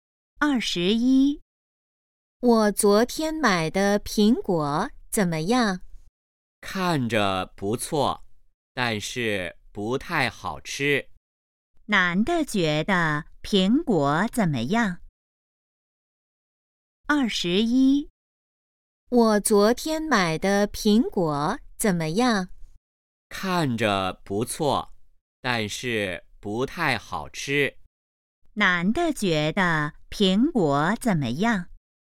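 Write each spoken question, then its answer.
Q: 男的觉得苹果怎么样?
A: 不太好吃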